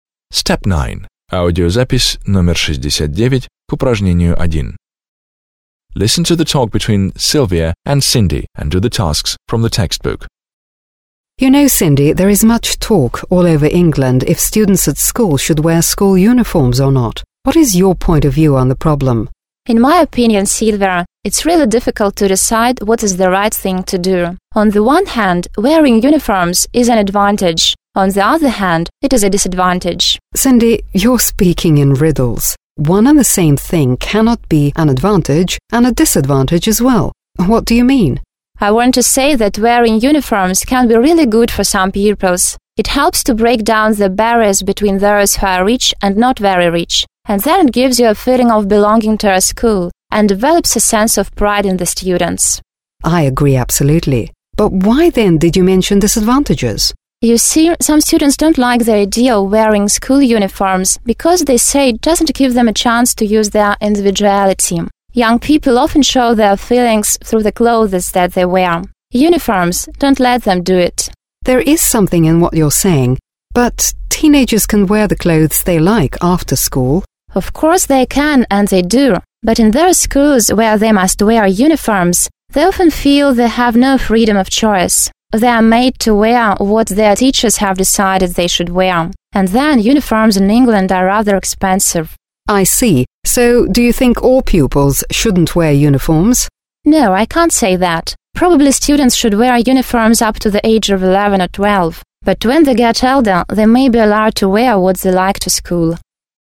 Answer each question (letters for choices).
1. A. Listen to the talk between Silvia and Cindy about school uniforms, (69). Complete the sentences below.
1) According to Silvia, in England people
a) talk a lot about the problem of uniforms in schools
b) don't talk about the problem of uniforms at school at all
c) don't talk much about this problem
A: a

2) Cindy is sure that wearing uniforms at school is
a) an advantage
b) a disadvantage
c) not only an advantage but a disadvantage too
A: c

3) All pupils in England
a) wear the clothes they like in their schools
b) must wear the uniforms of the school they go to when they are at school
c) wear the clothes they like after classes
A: c

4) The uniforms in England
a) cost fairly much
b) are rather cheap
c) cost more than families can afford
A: a

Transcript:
• You know, Cindy, there is much talk all over England whether students at school should wear school uniforms or not. What is your point of view on the problem?
• In my opinion, Silvia, it's really difficult to decide what is the right thing to do. On the one hand, wearing uniforms is an advantage, on the other hand, it is a disadvantage.
• Cindy, you're speaking in riddles. One and the same thing cannot be an advantage and a disadvantage as well. What do you mean?
• I want to say that wearing uniforms can be really good for some pupils. It helps to break down the barriers between those who are rich and not very rich, and then it gives you a feeling of belonging to your school and develops a sense of pride in the students.
• I agree absolutely. But why then did you mention disadvantages?
• You see, some students don't like the idea of wearing school uniforms because they say it doesn't give them a chance to show their individuality. Young people often show their feelings through the clothes that they wear. Uniforms don't let them do that.
• There is something in what you're saying but teenagers can wear the clothes they like after school.
• Of course they can and they do. But in those schools where they must wear uniforms, they often feel they have no freedom of choice. They are made to wear what their teachers have decided they should wear. And also uniforms in England are rather expensive.
• I see. So, do you think all pupils shouldn't wear uniforms?
• No, I wouldn't say that. Probably students should wear uniforms up to the age of 11 or 12, but when they get older they should be allowed to wear what they like to school.

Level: 9 класс